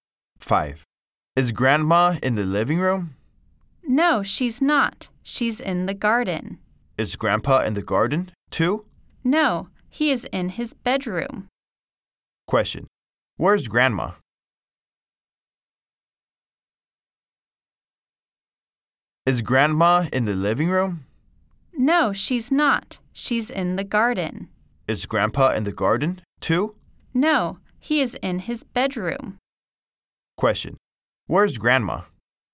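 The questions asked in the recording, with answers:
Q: Where's Grandma?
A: In the garden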